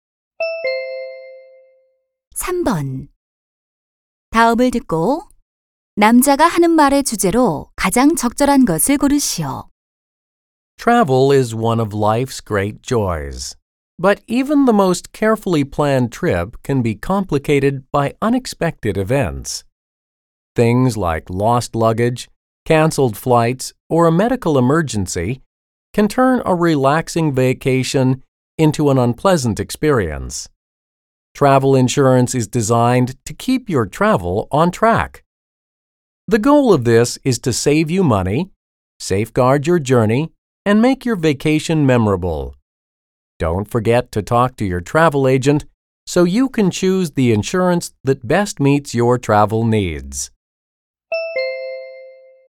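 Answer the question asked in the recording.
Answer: 여행자 보험의 필요성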